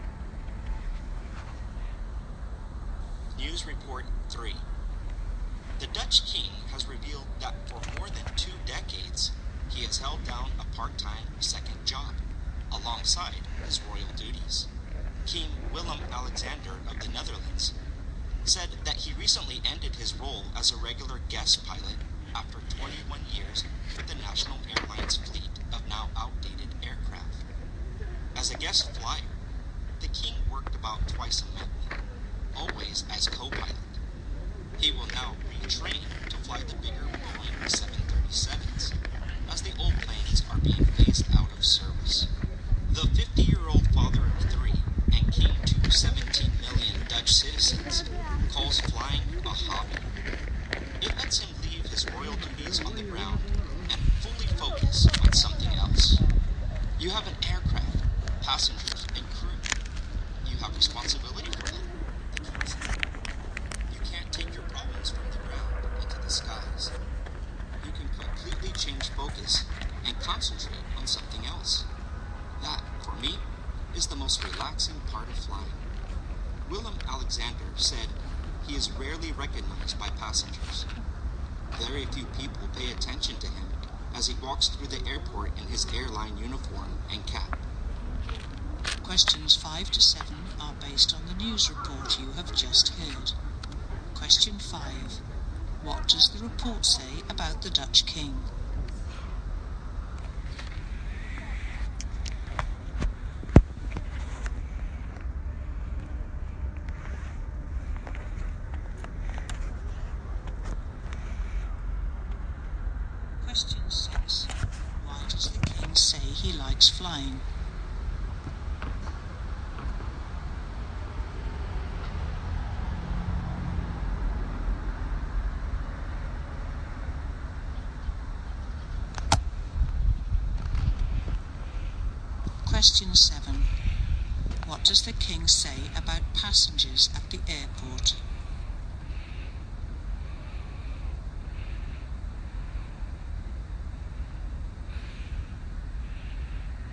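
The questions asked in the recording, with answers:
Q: What does the report say about the Dutch King?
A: For 21 years he had a part-time second job as a guest co-pilot for the national airline.

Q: Why does the King say he likes flying?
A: He can completely change focus and leave his problems on the ground, which relaxes him.

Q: What does the King say about passengers at the airport?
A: They rarely recognize him.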